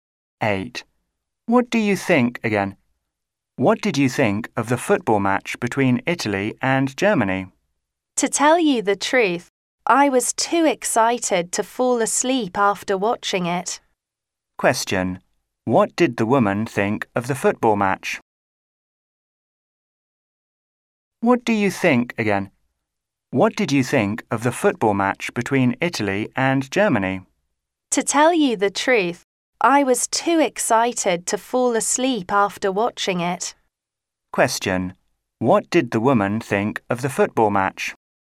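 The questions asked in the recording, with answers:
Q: Question: What did the woman think of the football match?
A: It was very exciting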